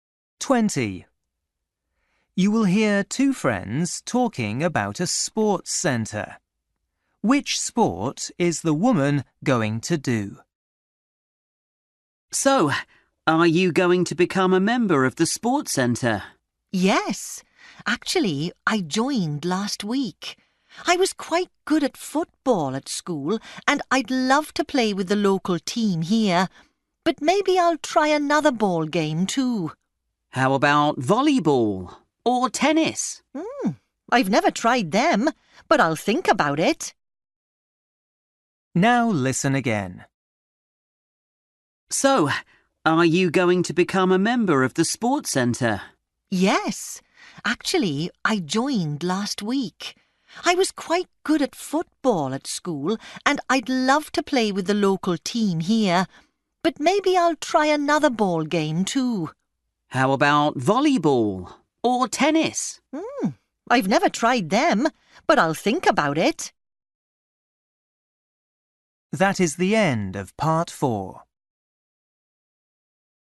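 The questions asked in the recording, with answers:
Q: Which sport is the woman going to do?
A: Football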